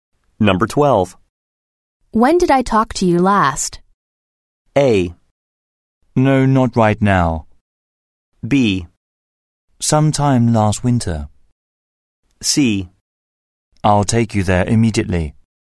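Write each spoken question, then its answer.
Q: When did I talk to you last?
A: B: Sometime last winter.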